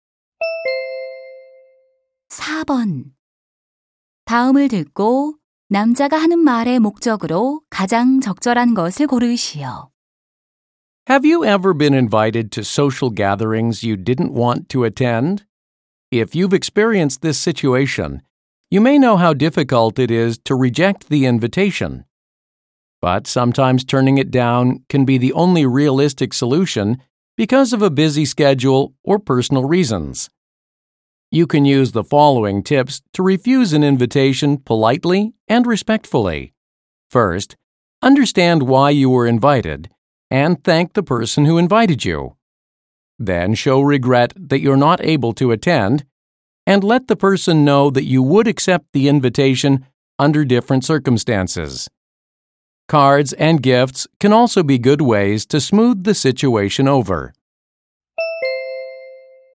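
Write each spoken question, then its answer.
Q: 다음을 듣고 남자가 하는 말의 목적으로 가장 적절한 것을 고르시오.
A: 초대를 정중하게 거절하는 방법을 알려 주려고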